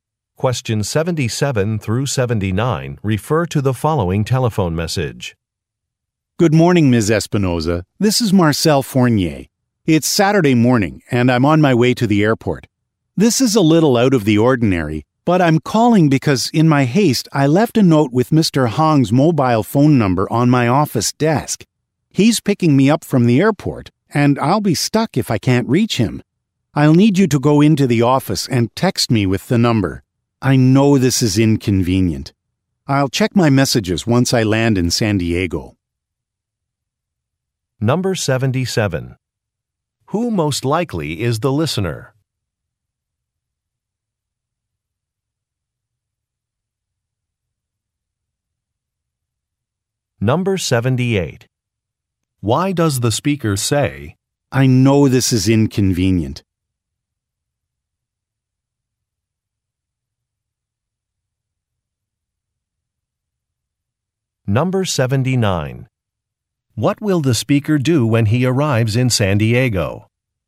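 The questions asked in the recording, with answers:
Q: What will the speaker do when he arrives in San Diego?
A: Check his messages.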